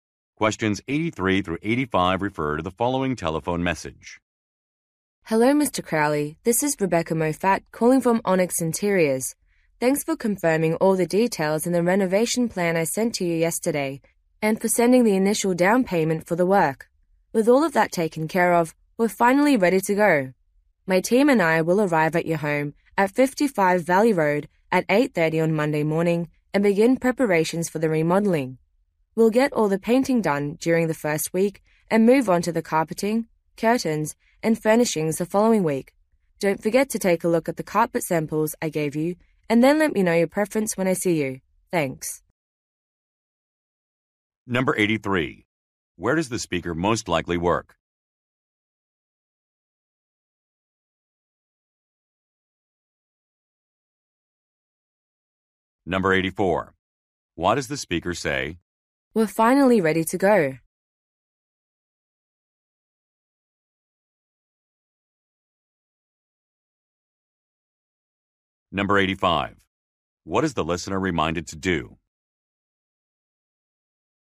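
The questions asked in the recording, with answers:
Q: Where does the speaker most likely work?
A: At an interior design company

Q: What is the listener reminded to do?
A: Look at the carpet samples and choose one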